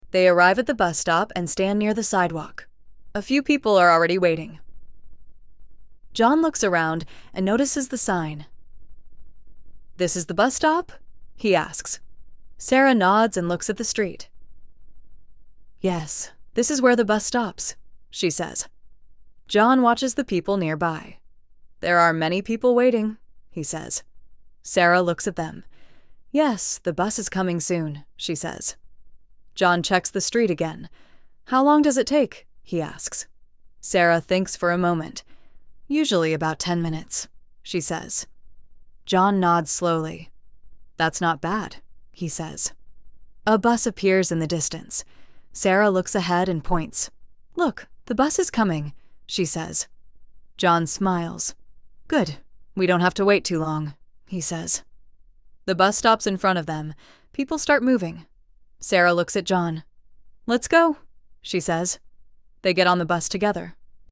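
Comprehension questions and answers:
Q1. Where are they?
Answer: At the bus stop

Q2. Are there many people there?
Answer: Yes, there are many people waiting

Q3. How long does it take?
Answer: Usually about ten minutes

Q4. Is the bus coming?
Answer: Yes, the bus is coming

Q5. What do they do at the end?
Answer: They get on the bus together

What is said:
They arrive at the bus stop and stand near the sidewalk. A few people are already waiting.
John looks around and notices the sign.
"This is the bus stop?" he asks.
Sarah nods and looks at the street.
"Yes, this is where the bus stops," she says.
John watches the people nearby.
"There are many people waiting," he says.
Sarah looks at them.
"Yes, the bus is coming soon," she says.
John checks the street again.
"How long does it take?" he asks.
Sarah thinks for a moment.
"Usually about ten minutes," she says.
John nods slowly.
"That's not bad," he says.
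A bus appears in the distance.
Sarah looks ahead and points.
"Look, the bus is coming," she says.
John smiles.
"Good, we don't have to wait too long," he says.
The bus stops in front of them.
People start moving.
"Let's go," she says.
They get on the bus together.

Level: Inglês Básico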